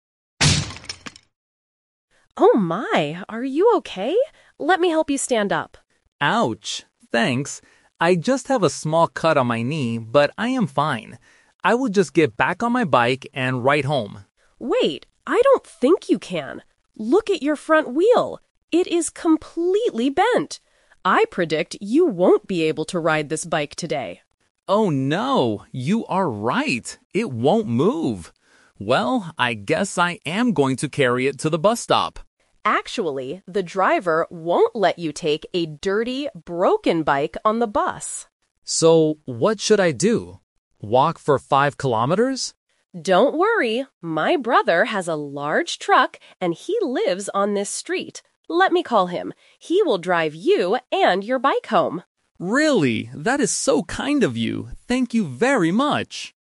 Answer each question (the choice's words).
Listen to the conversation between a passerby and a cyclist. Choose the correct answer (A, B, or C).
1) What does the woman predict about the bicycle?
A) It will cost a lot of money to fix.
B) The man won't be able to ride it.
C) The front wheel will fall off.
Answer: The man won't be able to ride it.

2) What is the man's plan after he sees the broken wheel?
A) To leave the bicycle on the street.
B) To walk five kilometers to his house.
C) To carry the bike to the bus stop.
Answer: To carry the bike to the bus stop.

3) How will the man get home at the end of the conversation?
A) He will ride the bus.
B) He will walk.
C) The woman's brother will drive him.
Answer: The woman's brother will drive him.

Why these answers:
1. The woman points at the wheel and says, "I predict you won't be able to ride this bike today." Trap: Option (A) is a very plausible thought in real life when something breaks, but it is never mentioned. Option (C) is an exaggeration; the wheel is "bent" (cong), not falling off.
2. Realizing the bike is broken, the man says, "Well, I guess I am going to carry it to the bus stop." Trap: Option (B) is a trap. He mentions "Walk for five kilometers?" later as a frustrated question, but it wasn't his actual plan. Option (A) is not mentioned.
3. The woman offers a solution: "My brother has a large truck... He will drive you and your bike home!" Trap: Option (A) is the classic A2 "Twist" trap. Taking the bus was his plan, but the woman warned him the driver wouldn't allow a broken bike on board. Option (B) is the rejected idea because it is too far.

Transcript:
Woman: Oh my! Are you okay? Let me help you stand up.
Man: Ouch... Thanks. I just have a small cut on my knee, but I am fine. I will just get back on my bike and ride home.
Woman: Wait, I don't think you can. Look at your front wheel. It is completely bent! I predict you won't be able to ride this bike today.
Man: Oh no! You are right. It won't move. Well, I guess I am going to carry it to the bus stop.
Woman: Actually, the driver won't let you take a dirty, broken bike on the bus!
Man: So what should I do? Walk for five kilometers?
Woman: Don't worry. My brother has a large truck, and he lives on this street. Let me call him. He will drive you and your bike home!